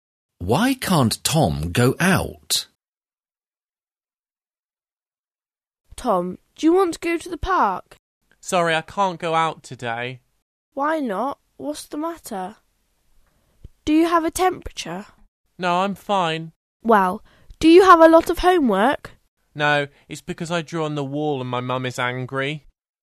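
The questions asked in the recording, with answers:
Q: Why can't Tom go out?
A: He drew on the wall and his mum is angry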